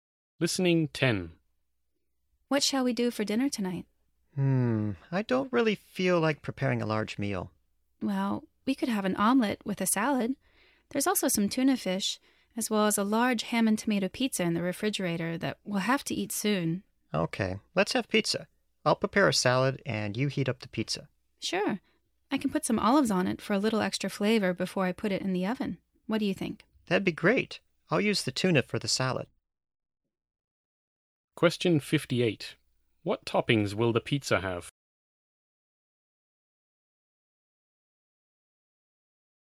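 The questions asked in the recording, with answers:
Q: What toppings will the pizza have?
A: Ham, tomato and olives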